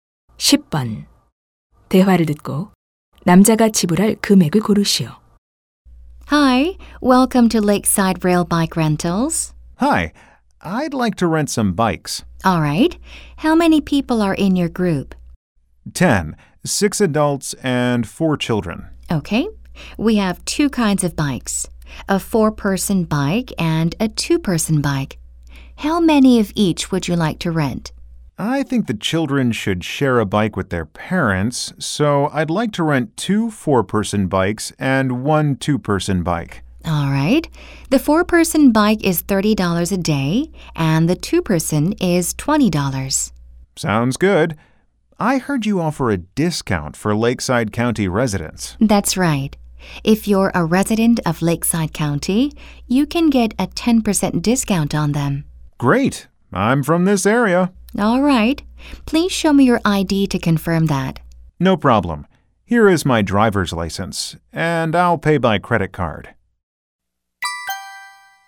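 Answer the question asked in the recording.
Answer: $72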